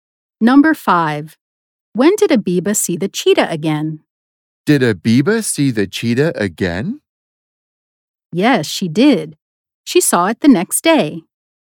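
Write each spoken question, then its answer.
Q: When did Abiba see the cheetah again?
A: the next day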